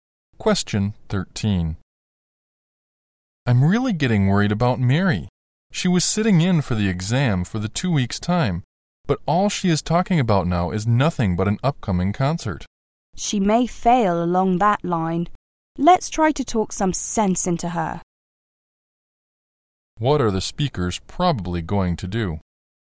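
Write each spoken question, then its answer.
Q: What are the speakers probably going to do?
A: Talk some sense into Mary about her exam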